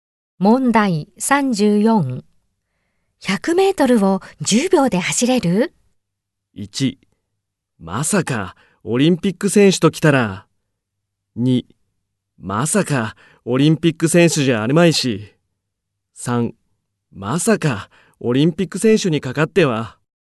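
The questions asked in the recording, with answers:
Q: 100メートルを10秒で走れる?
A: 2: まさかオリンピック選手じゃあるまいし。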